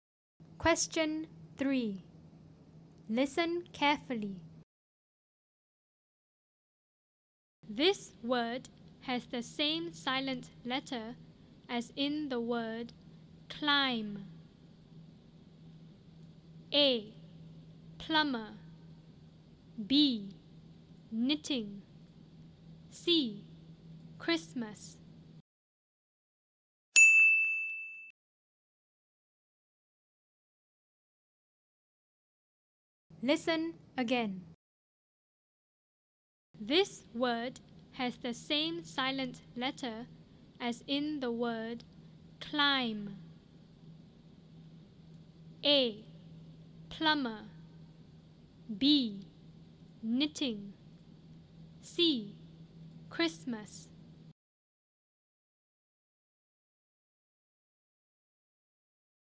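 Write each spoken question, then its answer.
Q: This word has the same silent letter as in the word climb.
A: A: Plumber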